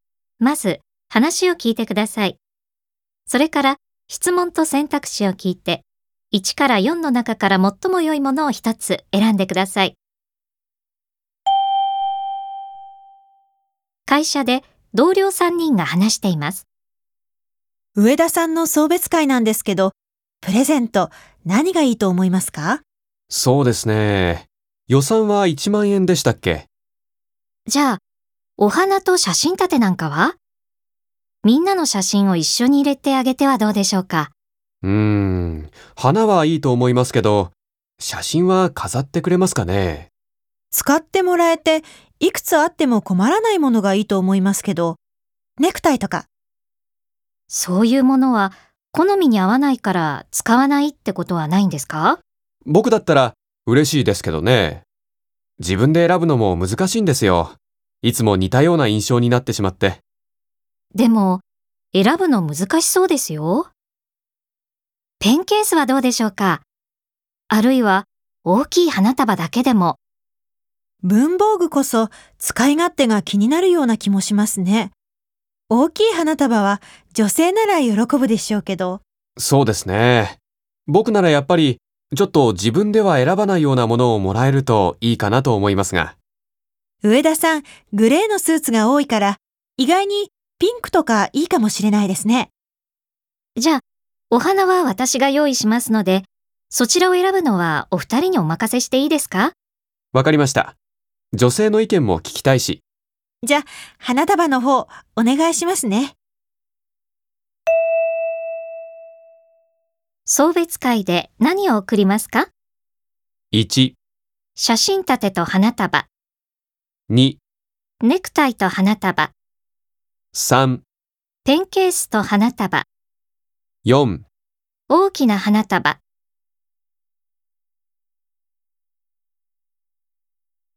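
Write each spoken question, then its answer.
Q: 送別会で何を贈りますか?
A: 2: ネクタイと花束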